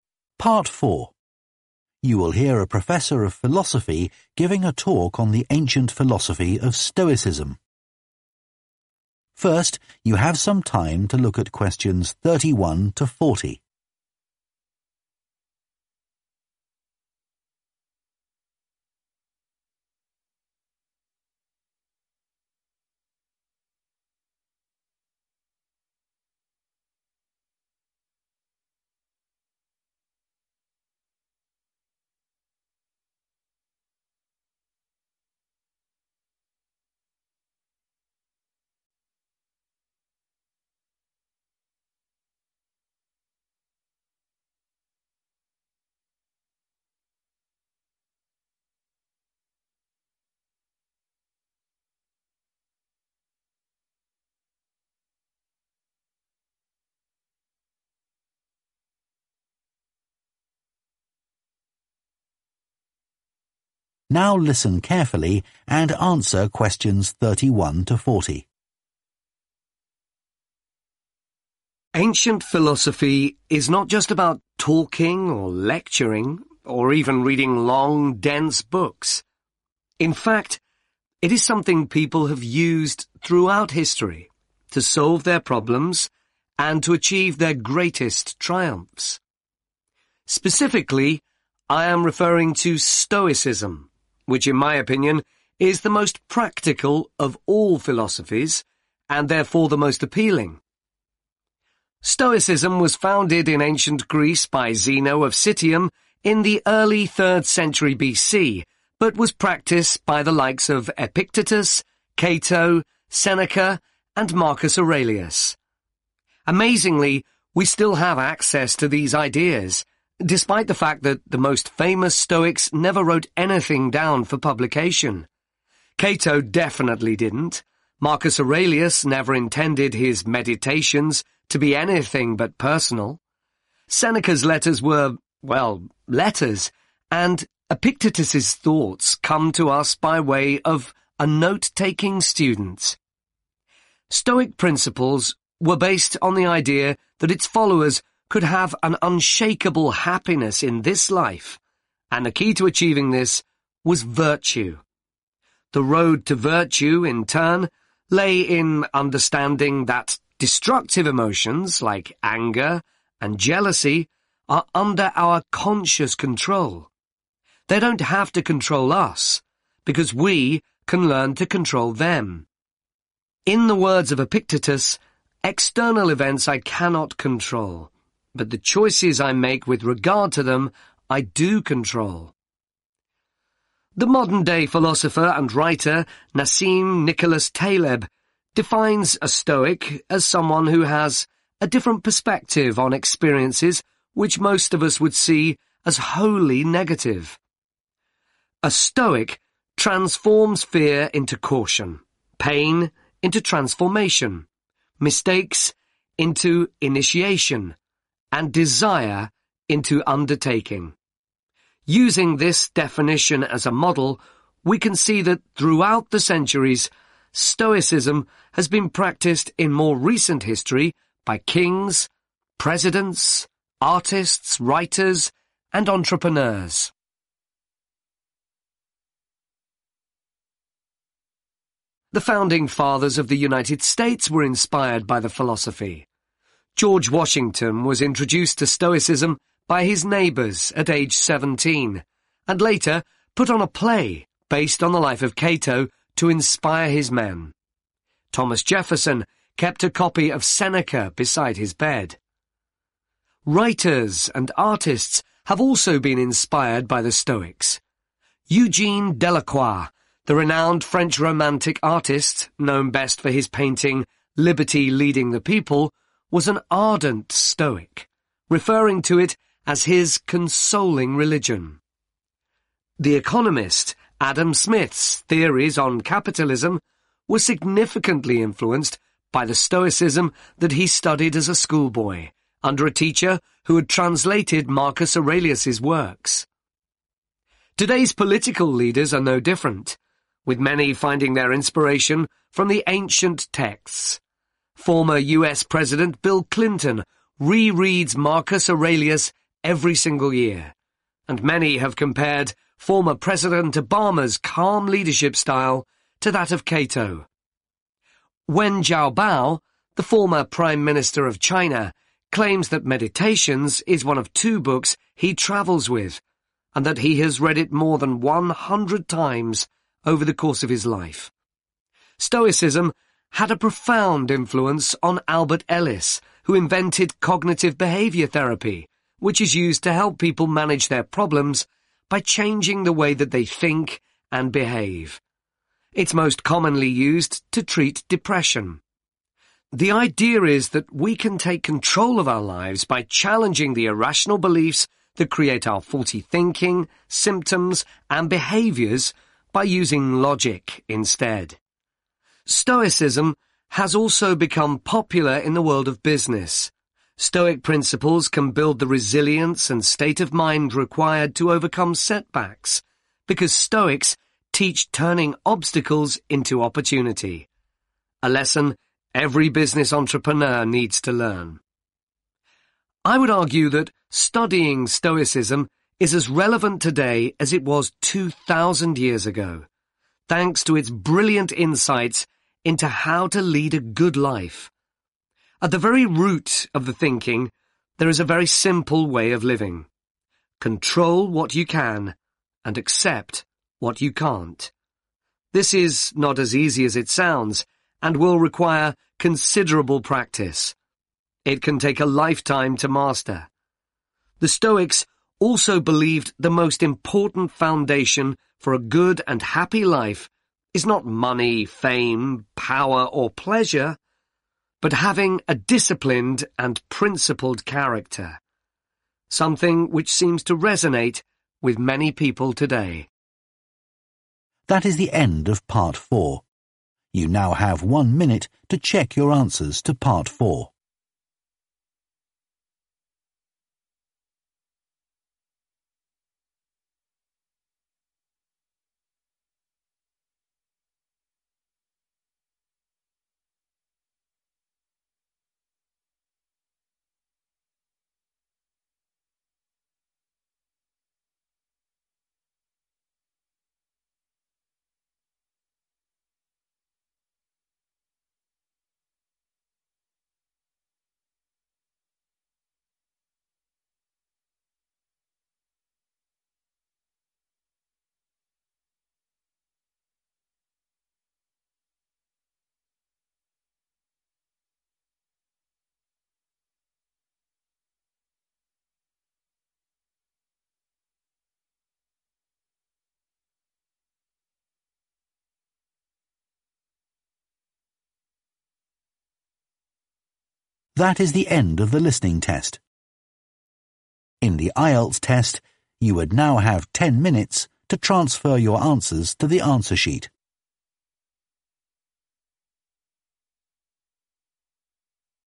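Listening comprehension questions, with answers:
Complete the notes below. Write ONE WORD ONLY for each answer.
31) Stoicism is still relevant today because of its 31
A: practical

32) The Stoics' ideas are surprisingly well known, despite not being intended for 32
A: publication

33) Epictetus said that external events cannot be controlled, but the 33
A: choices

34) A Stoic is someone who has a different view on experiences which others would consider as 34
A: negative

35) George Washington organised a 35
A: play

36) Adam Smith's ideas on 36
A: capitalism

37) Cognitive Behaviour Therapy (CBT) – the treatment for 37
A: depression

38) is based on ideas from Stoicism – people learn to base their thinking on 38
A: logic

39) In business, people benefit from Stoicism by identifying obstacles as 39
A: opportunity

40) It requires a lot of 40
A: practice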